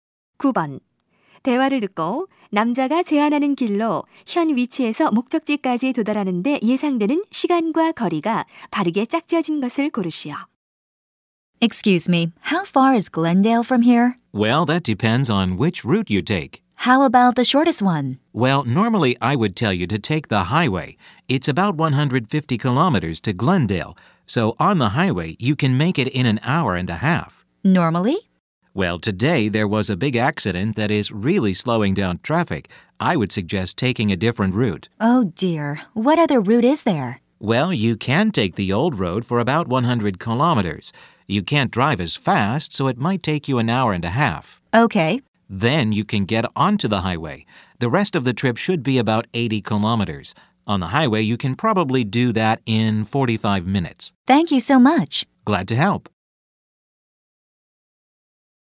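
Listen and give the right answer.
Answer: 2시간 15분, 180킬로미터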